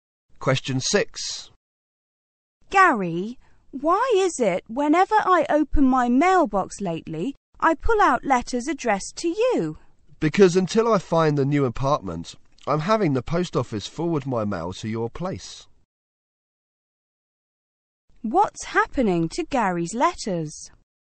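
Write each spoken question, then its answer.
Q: What's happening to Gary's letters?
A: They are being forwarded to the woman's place.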